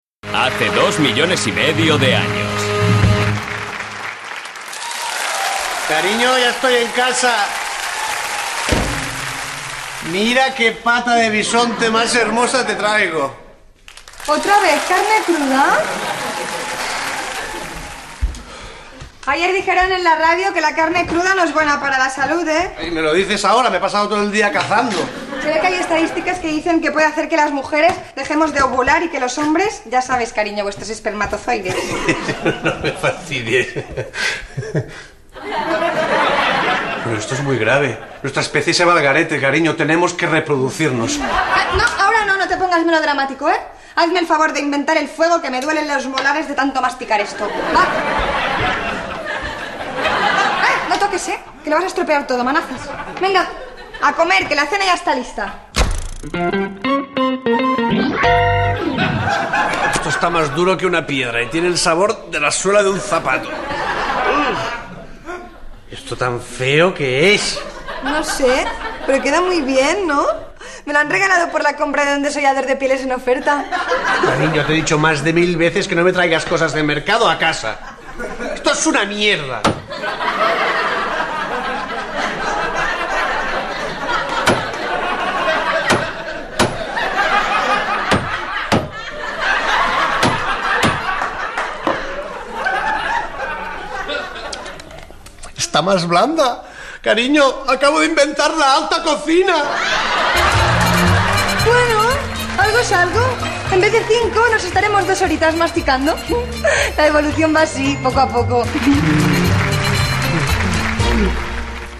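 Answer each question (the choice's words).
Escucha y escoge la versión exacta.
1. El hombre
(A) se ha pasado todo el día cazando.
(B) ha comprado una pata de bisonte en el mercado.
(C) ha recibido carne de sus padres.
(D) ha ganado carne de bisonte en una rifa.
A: se ha pasado todo el día cazando.

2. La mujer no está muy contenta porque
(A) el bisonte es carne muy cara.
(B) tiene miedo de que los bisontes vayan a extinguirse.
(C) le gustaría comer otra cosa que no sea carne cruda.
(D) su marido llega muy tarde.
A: le gustaría comer otra cosa que no sea carne cruda.

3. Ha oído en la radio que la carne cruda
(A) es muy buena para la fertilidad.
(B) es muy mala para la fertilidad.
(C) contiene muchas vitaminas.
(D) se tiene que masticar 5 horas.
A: es muy mala para la fertilidad.

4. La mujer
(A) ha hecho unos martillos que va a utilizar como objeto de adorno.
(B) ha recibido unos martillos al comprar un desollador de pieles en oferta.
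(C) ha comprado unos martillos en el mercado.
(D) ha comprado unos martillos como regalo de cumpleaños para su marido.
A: ha recibido unos martillos al comprar un desollador de pieles en oferta.

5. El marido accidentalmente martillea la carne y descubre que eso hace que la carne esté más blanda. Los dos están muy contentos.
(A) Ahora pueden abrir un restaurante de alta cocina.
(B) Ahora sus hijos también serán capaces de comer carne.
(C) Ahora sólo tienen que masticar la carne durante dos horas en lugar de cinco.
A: Ahora sólo tienen que masticar la carne durante dos horas en lugar de cinco.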